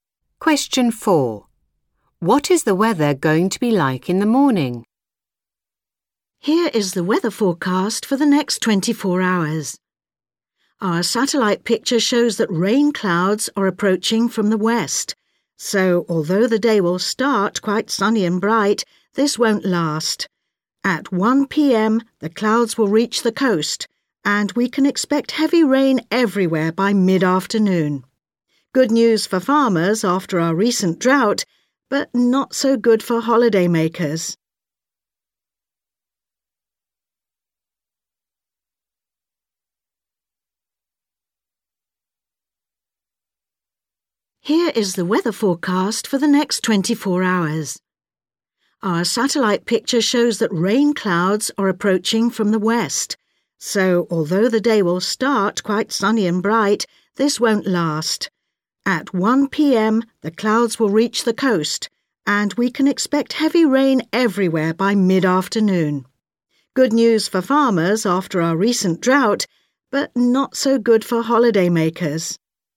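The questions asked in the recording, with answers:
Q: What is the weather going to be like in the morning?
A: Sunny and bright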